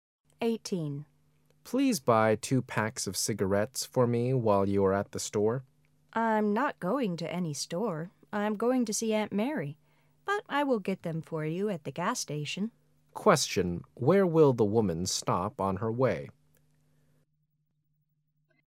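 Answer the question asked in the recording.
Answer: At the gas station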